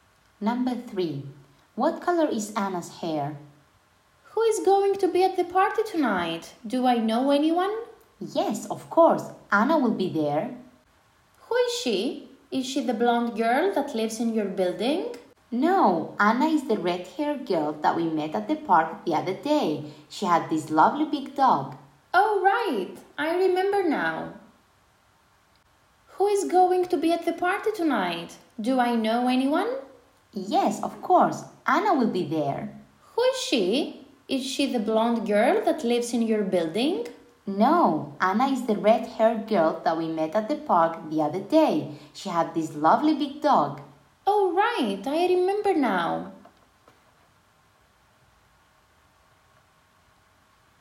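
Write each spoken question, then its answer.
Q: What color is Anna's hair?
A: Red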